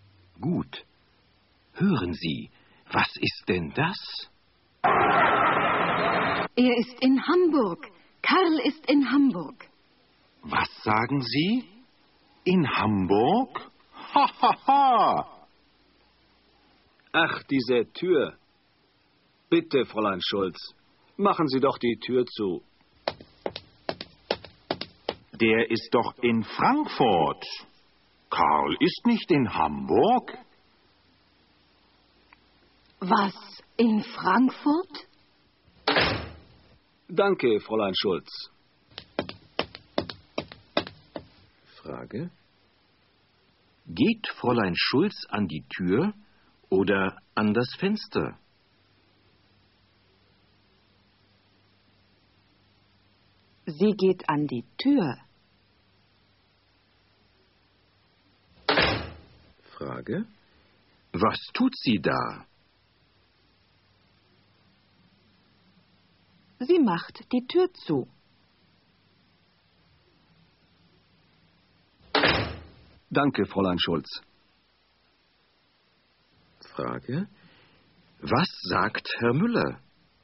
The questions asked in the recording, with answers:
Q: Geht Fräulein Schulz an die Tür oder an das Fenster?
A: Sie geht an die Tür.

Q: Was tut sie da?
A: Sie macht die Tür zu.